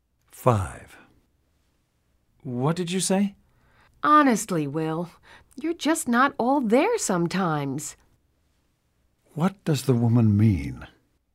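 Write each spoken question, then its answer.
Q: What does the woman mean?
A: Will is often not paying attention.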